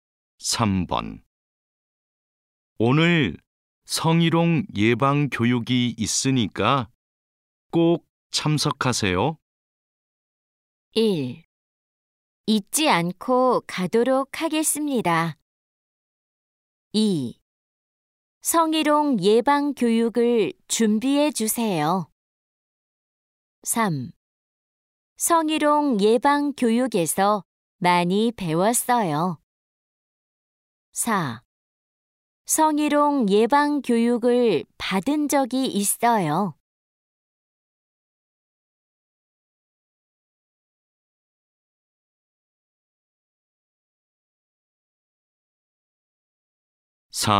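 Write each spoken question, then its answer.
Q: 오늘 성희롱 예방 교육이 있으니까 꼭 참석하세요.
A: 1: 잊지 않고 가도록 하겠습니다.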